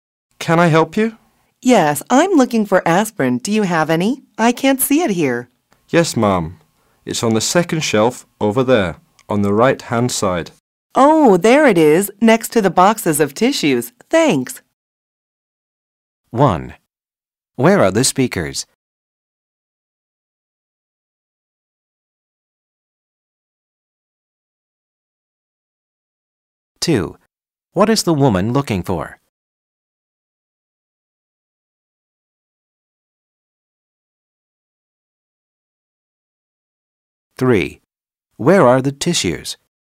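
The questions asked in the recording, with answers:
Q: Where are the speakers?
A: In a drugstore

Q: What is the woman looking for?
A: Aspirin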